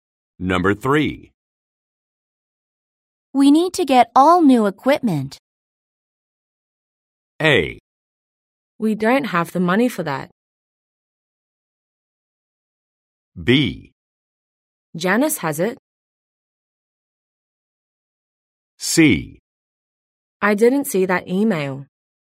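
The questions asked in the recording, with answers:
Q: We need to get all new equipment.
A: A: We don't have the money for that.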